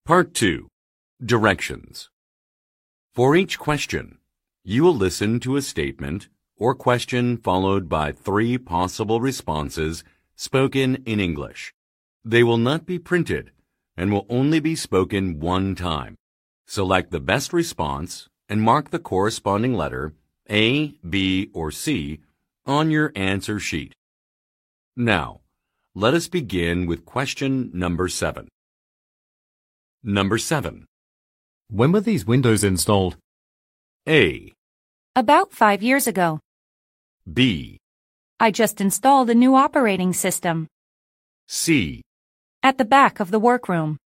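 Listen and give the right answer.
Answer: About 5 years ago.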